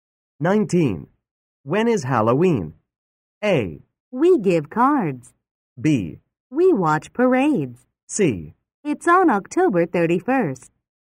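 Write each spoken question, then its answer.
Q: When is Halloween?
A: C: It's on October 31st.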